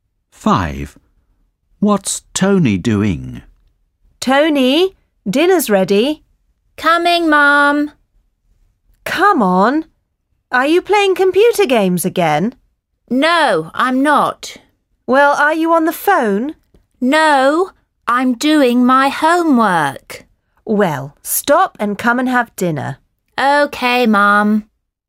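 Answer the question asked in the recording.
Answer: His homework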